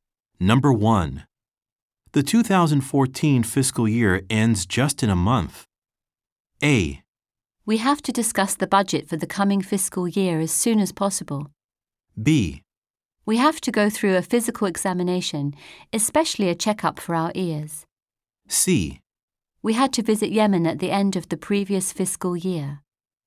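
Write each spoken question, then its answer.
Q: The 2014 fiscal year ends just in a month.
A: A: We have to discuss the budget for the coming fiscal year as soon as possible.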